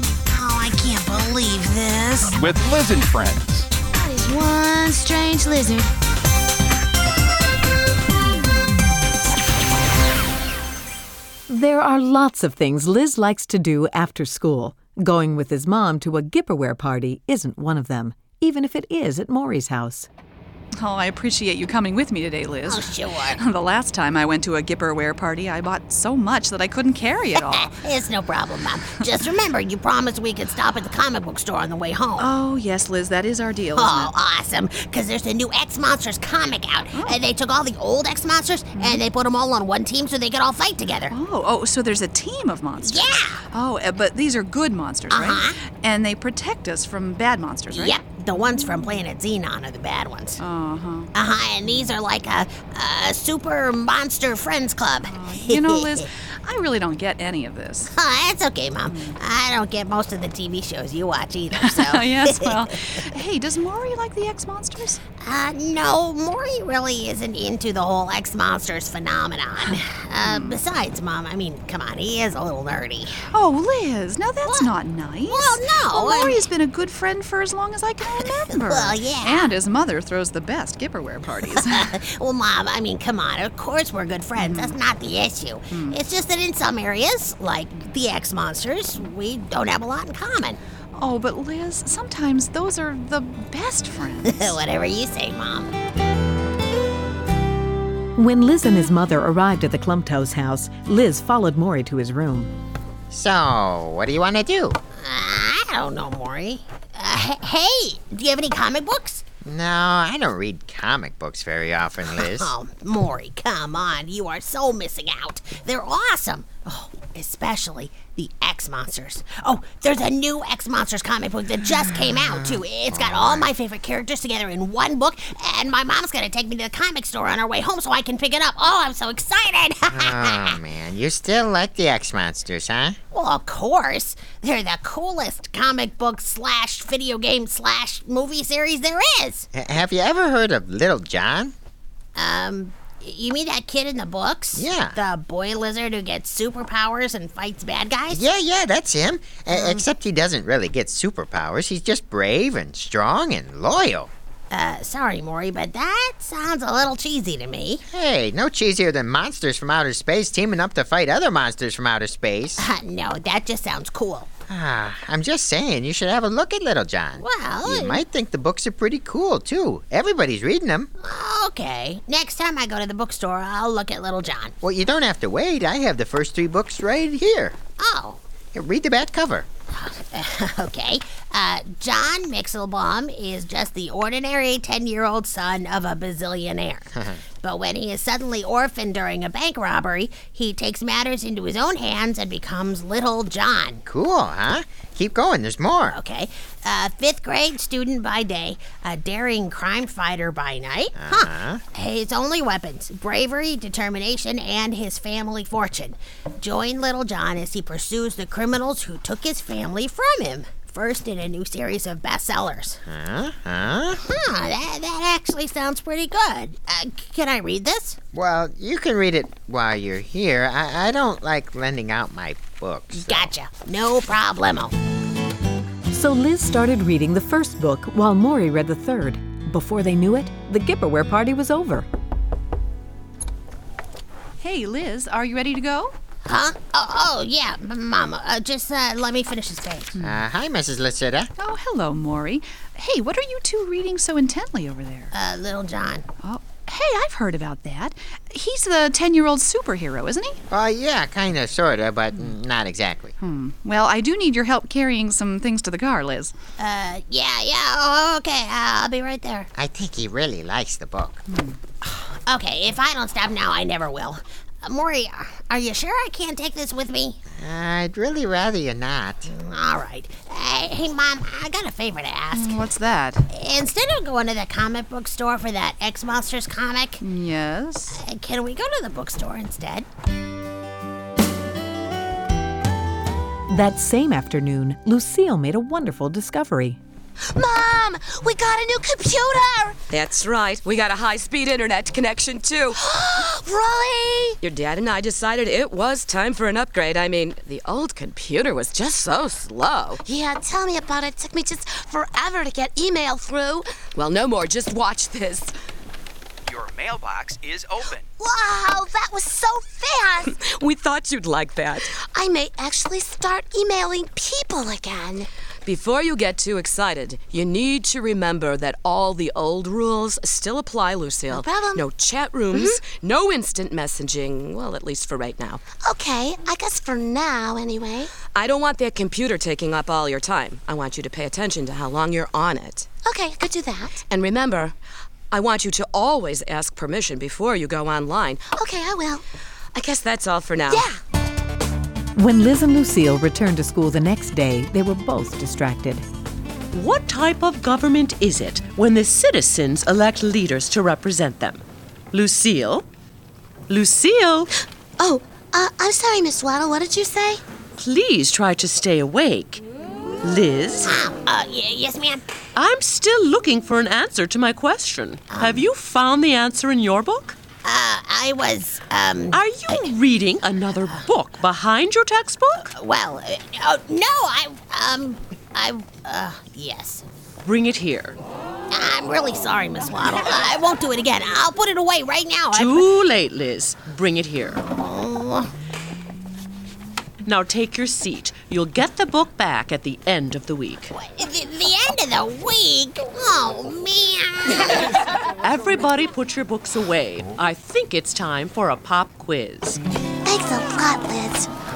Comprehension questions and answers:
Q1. What is the name of the character in the book series that Morrie and Liz read?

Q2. What did Lucille's family get?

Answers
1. Little John.
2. A new computer with faster Internet access.